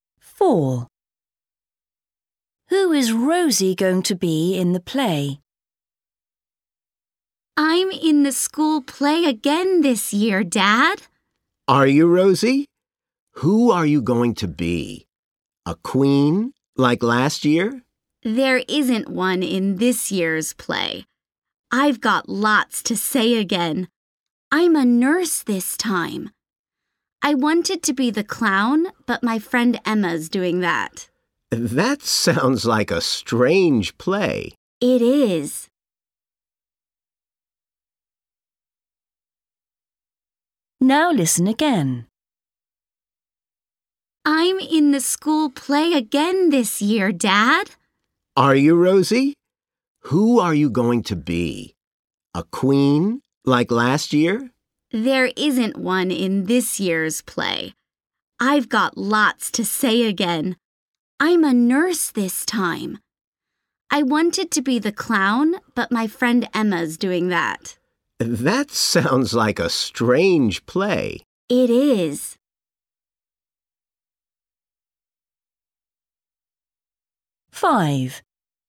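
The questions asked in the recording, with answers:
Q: Who is Rosie going to be in the play?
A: A nurse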